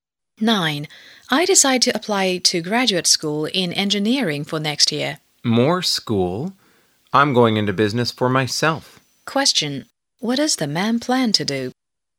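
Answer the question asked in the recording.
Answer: Start his own business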